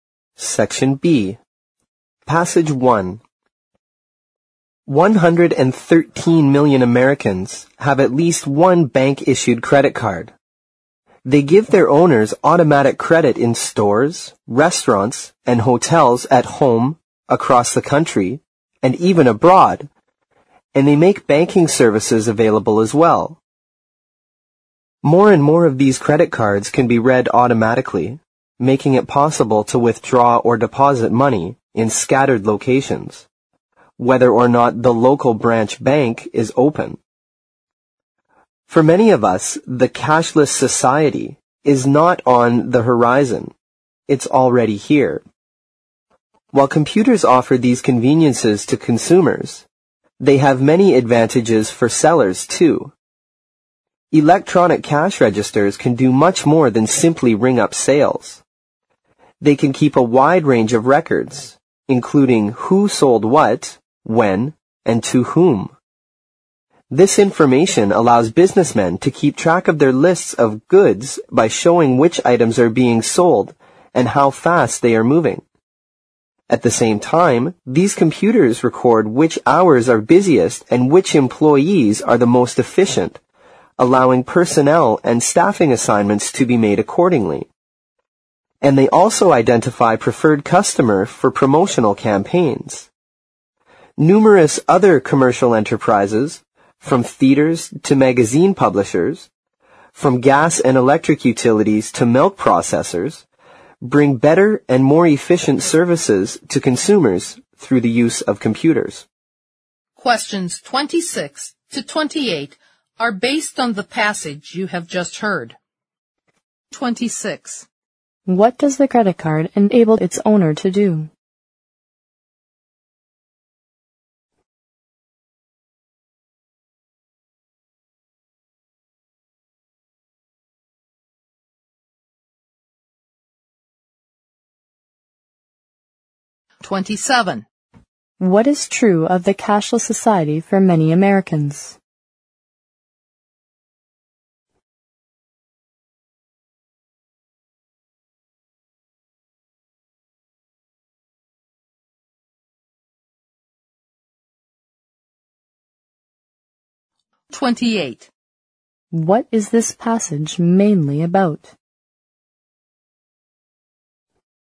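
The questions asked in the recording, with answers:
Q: What does the credit card enable its owner to do?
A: Get automatic credit in stores, restaurants and hotels, and use banking services such as withdrawing or depositing money

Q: What is true of the cashless society for many Americans?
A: It is already here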